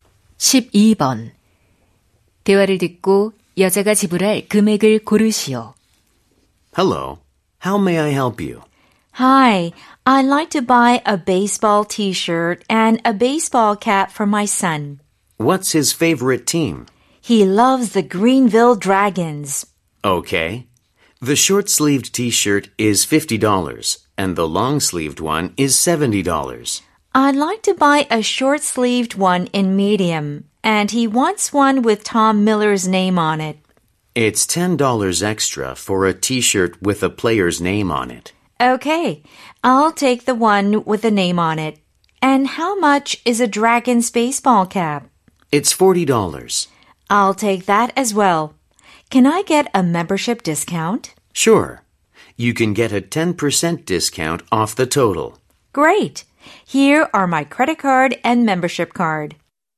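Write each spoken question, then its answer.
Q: 대화를 듣고 여자가 지불할 금액을 고르시오.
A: $90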